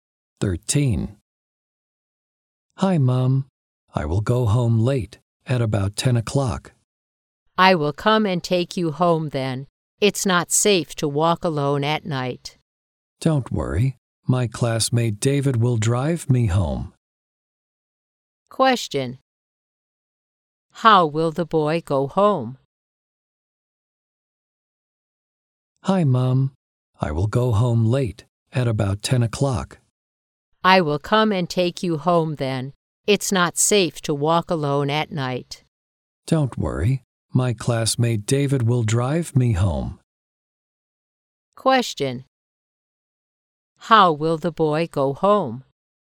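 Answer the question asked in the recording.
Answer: By car; his classmate David will drive him home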